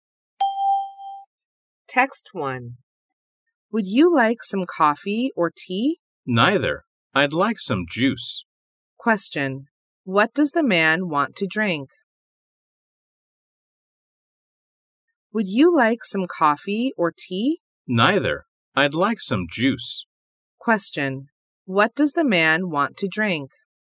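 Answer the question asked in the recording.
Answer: Juice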